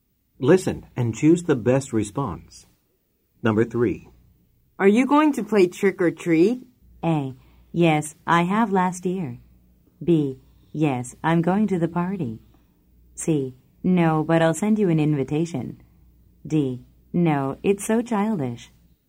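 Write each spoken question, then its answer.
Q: Are you going to play trick or treat?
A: D: No, it's so childish.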